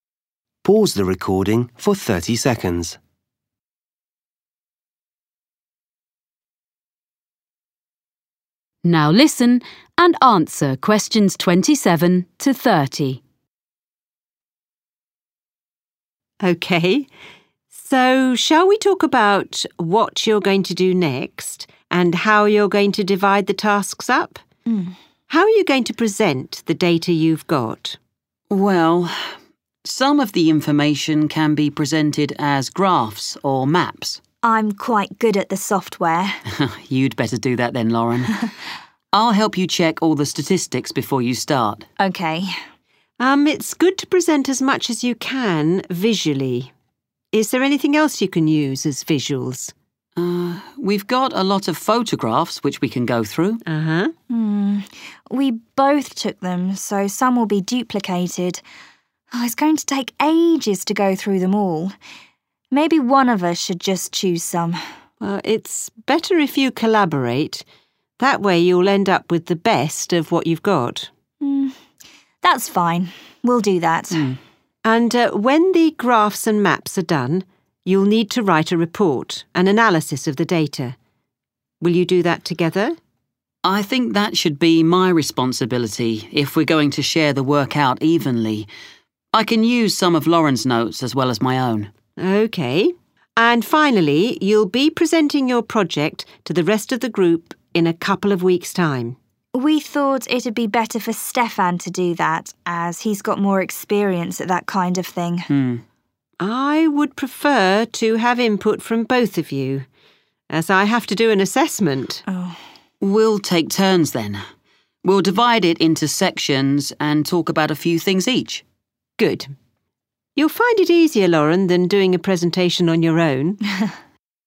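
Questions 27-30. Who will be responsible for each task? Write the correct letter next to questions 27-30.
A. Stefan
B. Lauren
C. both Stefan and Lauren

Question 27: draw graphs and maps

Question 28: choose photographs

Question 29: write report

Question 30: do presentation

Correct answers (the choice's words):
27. Lauren
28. both Stefan and Lauren
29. Stefan
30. both Stefan and Lauren

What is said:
Lauren: That's all we had time for while we were there.
Tutor: OK. So shall we talk about what you're going to do next and how you're going to divide the tasks up? How are you going to present the data you've got?
Stefan: Well, some of the information can be presented as graphs or maps.
Lauren: I'm quite good at software.
Stefan: You'd better do that then, Lauren. (Vậy bạn nên làm phần việc đó, Lauren) I'll help you check all the statistics before you start.
Lauren: OK.
Tutor: Um, it's good to present as much as you can visually. 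Is there anything else you can use as visuals?
Stefan: Mm ... we've got a lot of photographs which we can go through.
Lauren: Er, we both took them so some will be duplicated. It's going to take ages to go through them all. Maybe one of us should just choose some.
Tutor: It's better if you collaborate. That way you'll end up with the best of what you've got.
Lauren: That's fine. we'll do that.
Tutor: And, er,when the graphs and maps are done, you'll need to write a report, an analysis of the data. Will you do that together?
Stefan: I think that should be my responsibility if we're going to share the work out evenly. I can use some of Lauren's notes as well as my own.
Tutor: OK. And finally, you'll be presenting your project to the rest of the group in a couple of weeks' time.
Lauren: We thought it'd be better for Stefan to do that as he's got more experience at that kind of thing.
Tutor: I would prefer to have input from both of you as I have to do an assessment.
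Stefan: We'll take turns then. We'll divide it into sections and talk about a few things each.
Tutor: Good. You'll find it easier, Lauren, than doing a presentation on your own. Well, if you need to ask me any more questions while you're working on this, email me. I look forward to seeing what you produce.
Lauren: Thanks!
Stefan: Thanks!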